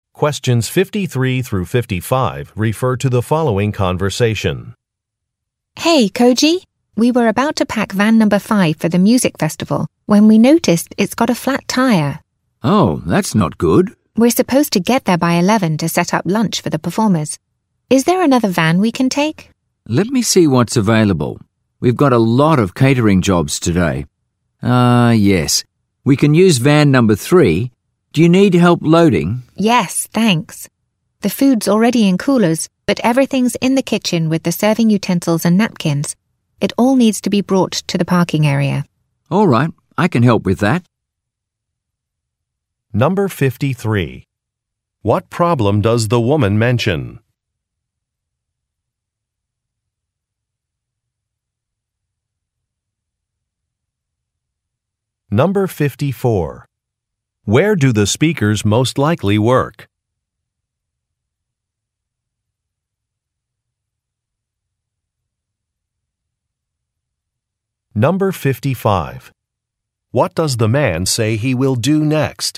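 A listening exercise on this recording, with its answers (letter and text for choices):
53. What problem does the woman mention?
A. A vehicle is out of service.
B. An employee is late.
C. A shipment was damaged.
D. Traffic is heavy.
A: A. A vehicle is out of service.

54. Where do the speakers most likely work?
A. At a recording studio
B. At a catering company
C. At a radio station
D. At a car dealership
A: B. At a catering company

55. What does the man say he will do next?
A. Arrange for a car repair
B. Order some kitchen supplies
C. Carry some items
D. Offer a refund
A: C. Carry some items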